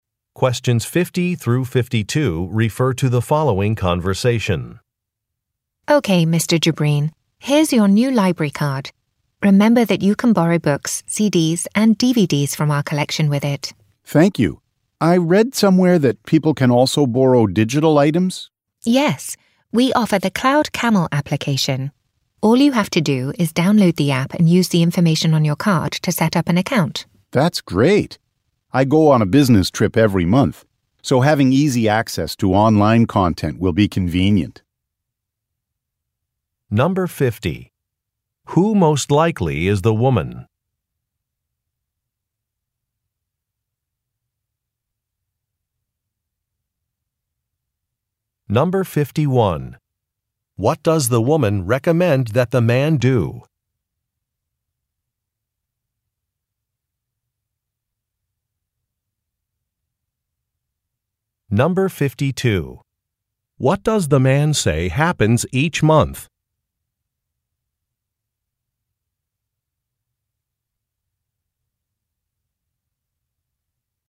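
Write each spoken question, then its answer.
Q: Who most likely is the woman?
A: A librarian

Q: What does the woman recommend that the man do?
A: Download an app

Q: What does the man say happens each month?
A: He goes on a business trip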